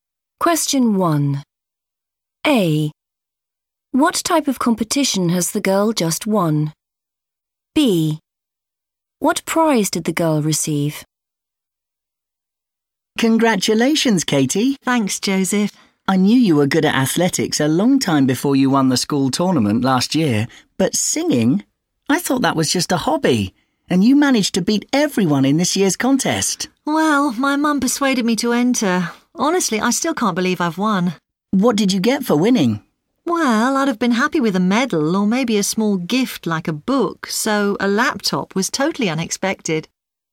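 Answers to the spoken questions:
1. a singing contest
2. a laptop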